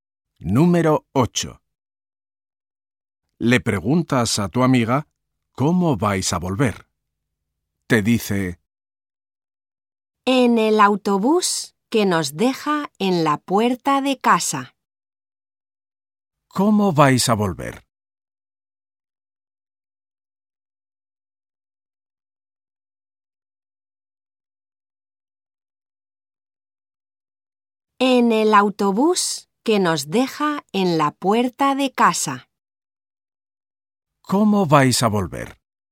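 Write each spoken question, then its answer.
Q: ¿Cómo vais a volver?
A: En autobús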